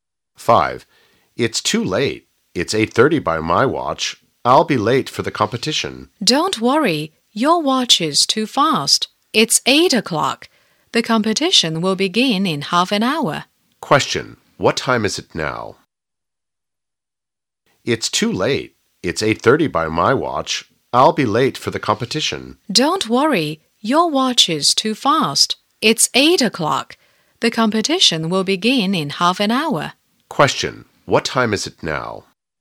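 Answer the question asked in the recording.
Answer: 8 o'clock.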